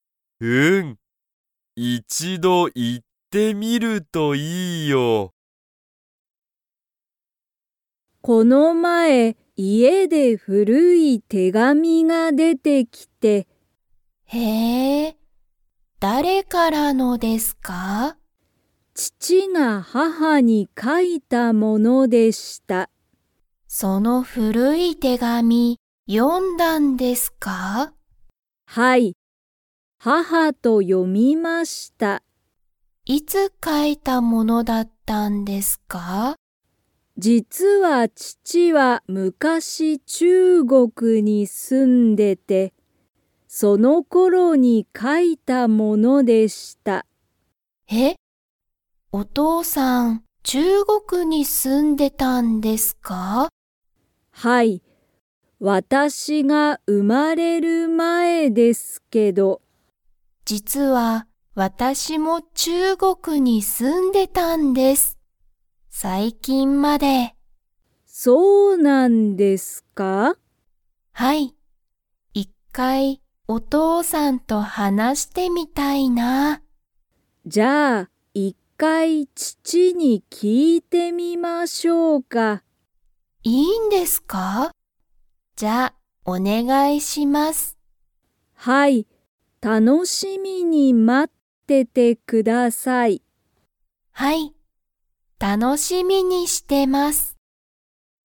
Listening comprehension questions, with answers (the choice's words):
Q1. この前まえ、小森こもりさんの家いえで古ふるい が出でてきた。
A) 母はは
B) 手紙てがみ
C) 料理りょうり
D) 中国ちゅうごく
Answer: 手紙てがみ

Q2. 太田おおたさんは最近さいきんまで中国ちゅうごくに住すんでいましたか?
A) はい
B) いいえ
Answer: はい

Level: Level 3